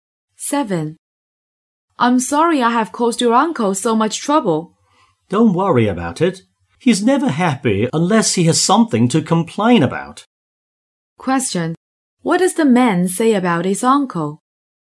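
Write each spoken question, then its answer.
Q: What does the man say about his uncle?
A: He always complains about something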